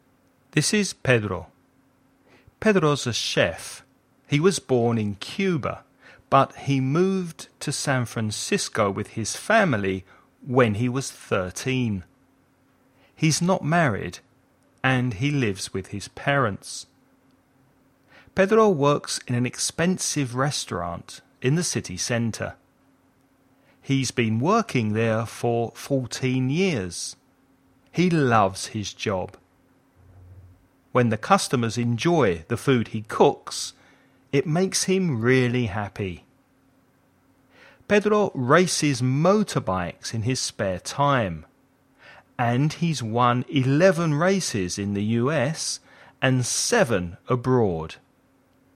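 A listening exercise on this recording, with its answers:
Escucha el audio y completa el ejercicio.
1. How old was Pedro when he left Cuba and moved to the US?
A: 13

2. What does Pedro do for a living?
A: He's a chef

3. How long has he been working in the restaurant?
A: 14 years

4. How does Pedro feel when the customers enjoy the food he has cooked?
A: Really happy

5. What's the total number of races* that Pedro has won all together?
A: 18

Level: nivel básico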